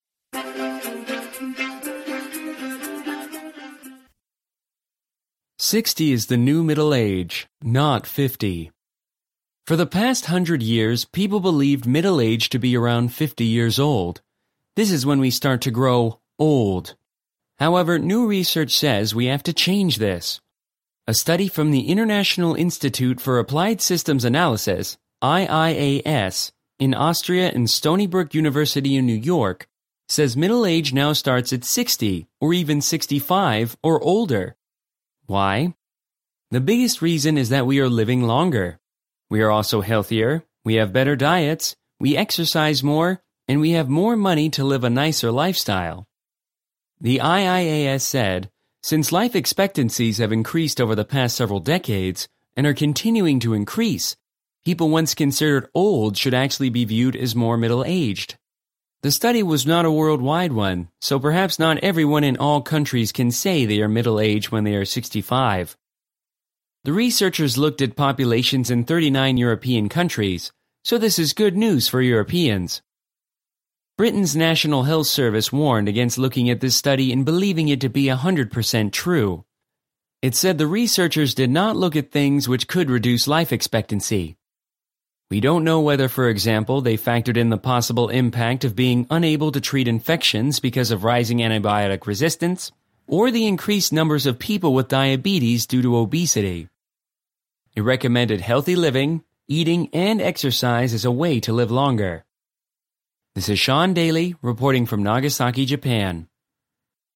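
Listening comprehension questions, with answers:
TRUE / FALSE:Read the headline. Guess if a-h below are true or false.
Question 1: People have thought middle age starts at 50 for the past 1,000 years.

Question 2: A new study on middle age is from an institute in Australia.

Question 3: Researchers say middle age could start later than 65.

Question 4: Life expectancies have been decreasing for decades.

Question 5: Researchers carried out their study on middle aged people worldwide.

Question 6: Britain's health service cautioned against believing all of the study.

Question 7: It is unclear whether researchers included obesity in their study.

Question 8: The health service suggested people exercise.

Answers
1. False
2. False
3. True
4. False
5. False
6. True
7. True
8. True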